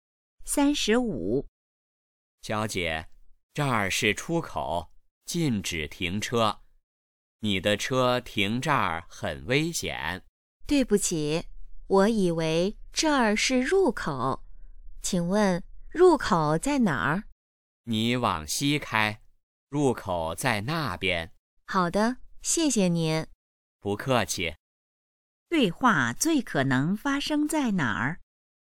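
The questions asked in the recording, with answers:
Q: 对话最可能发生在哪儿?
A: 停车场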